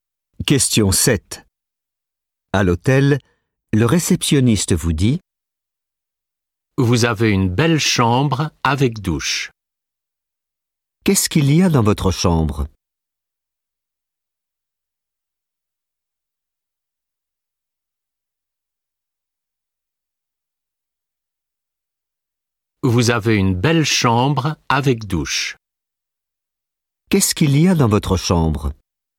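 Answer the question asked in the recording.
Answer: Une douche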